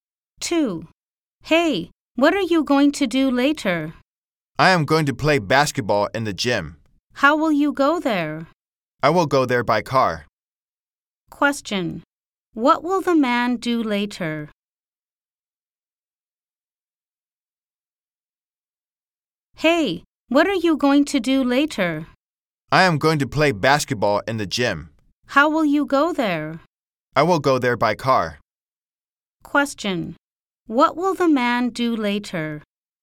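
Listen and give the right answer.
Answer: Play basketball in the gym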